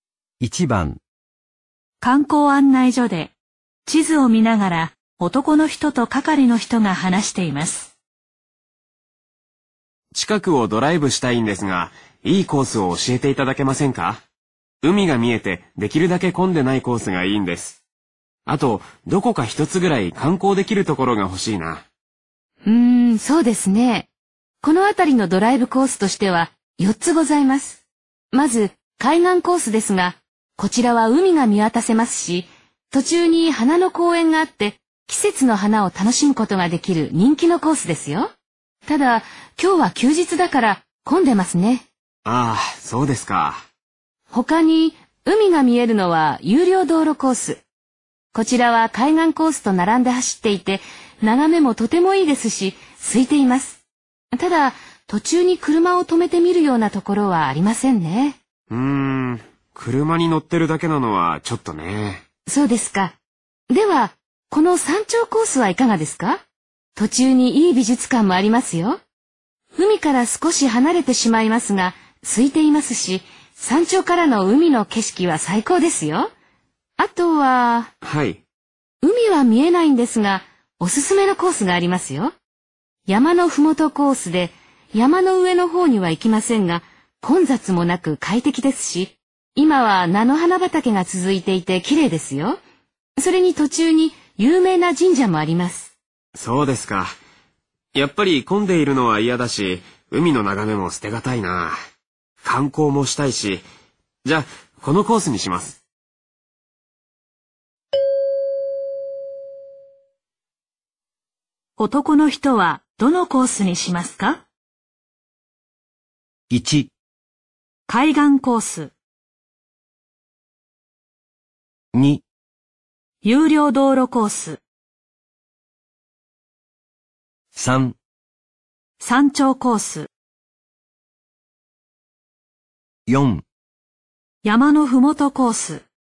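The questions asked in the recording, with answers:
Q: 男の人はどのコースにしますか?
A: 3: 山頂コース。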